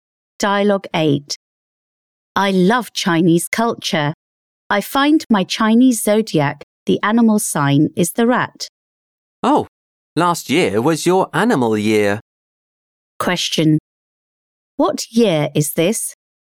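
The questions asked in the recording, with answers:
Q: What year is this?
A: The year of the ox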